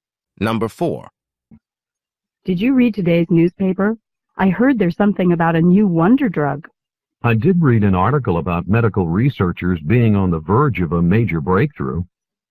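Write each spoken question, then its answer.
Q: What does the man mean?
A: Researchers are close to a major breakthrough on a new drug.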